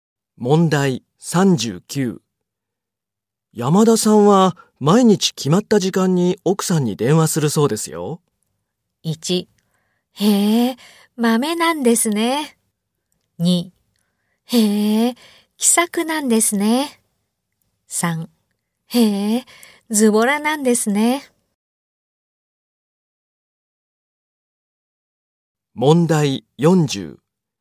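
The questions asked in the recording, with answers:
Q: 山田さんは毎日決まった時間に奥さんに電話するそうですよ。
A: 1: へえ、まめなんですね。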